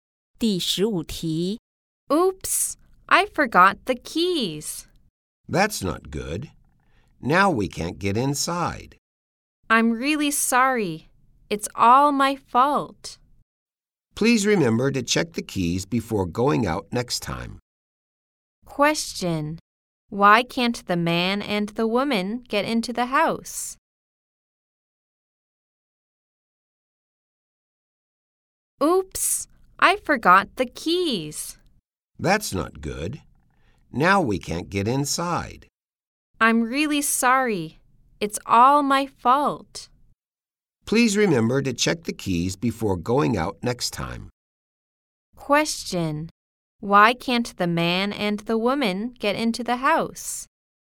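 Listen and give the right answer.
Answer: One of them forgot the keys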